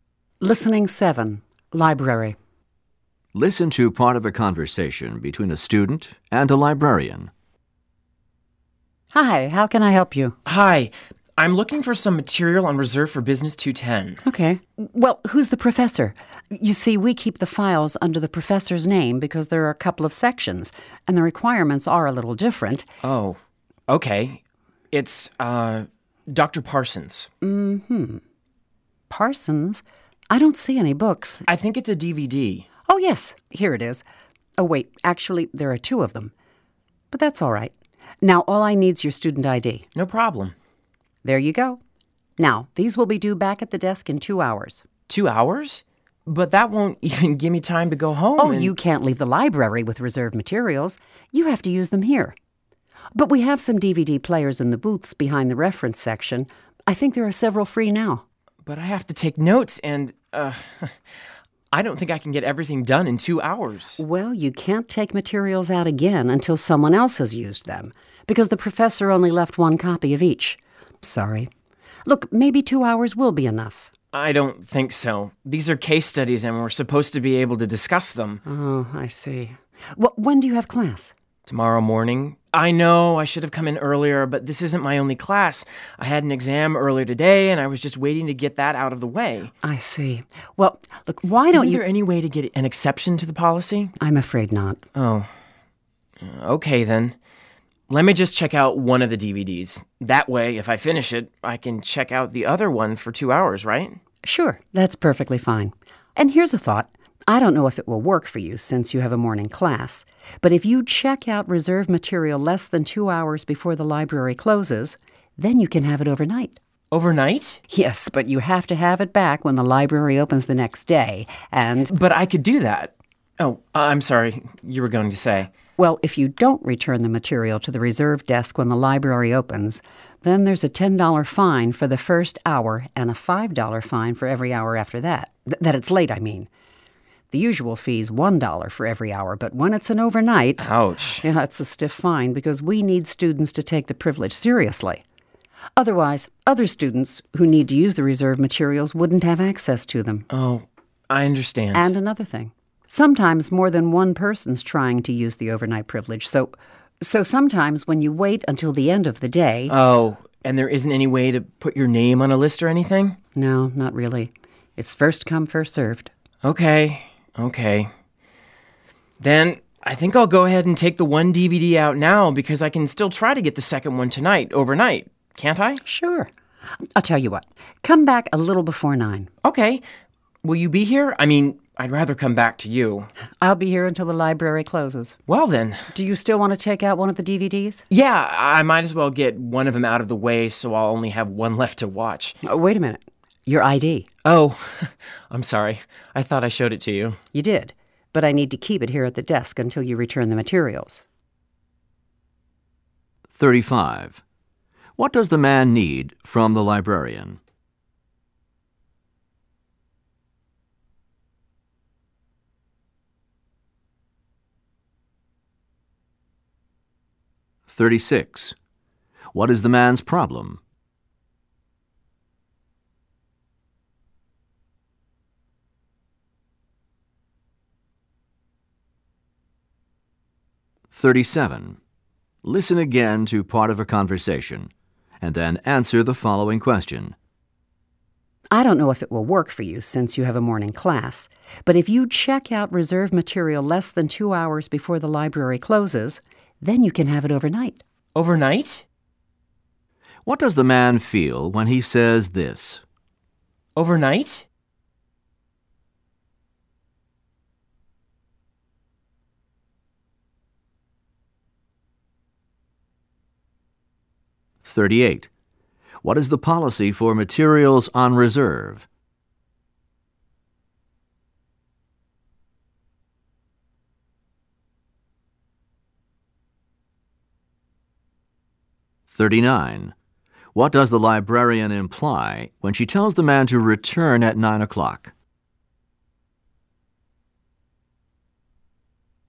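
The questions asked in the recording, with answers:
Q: What does the man need from the librarian?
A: Material on reserve (DVDs) for Business 210

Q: What is the man's problem?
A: He doesn't have enough time to watch the DVDs and take notes in 2 hours before class

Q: What is the policy for materials on reserve?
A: They must be used in the library for 2 hours, or taken overnight if checked out less than 2 hours before closing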